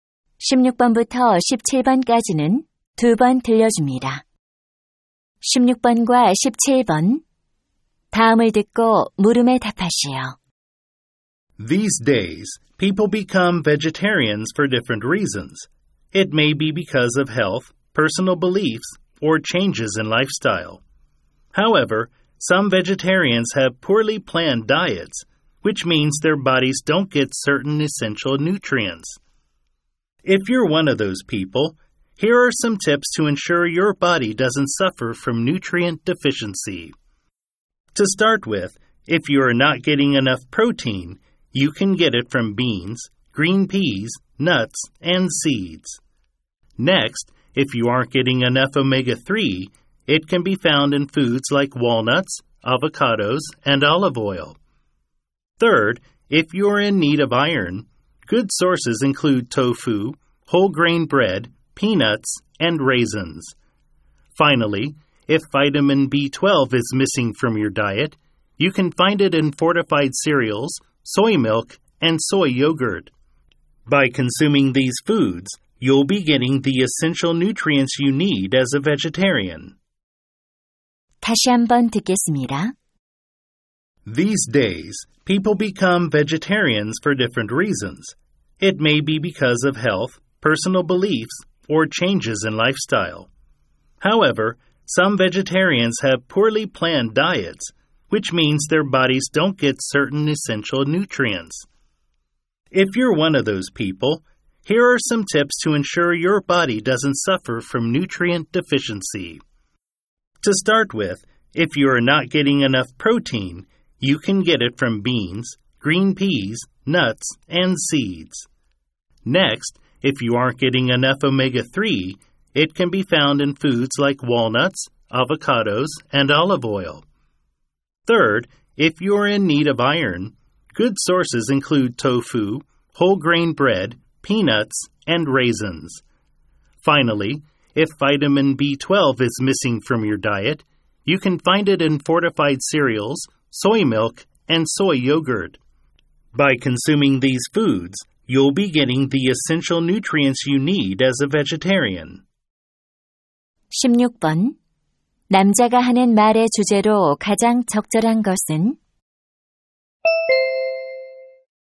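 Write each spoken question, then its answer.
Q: 남자가 하는 말의 주제로 가장 적절한 것은?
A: 채식주의자가 필수 영양소를 섭취할 수 있는 음식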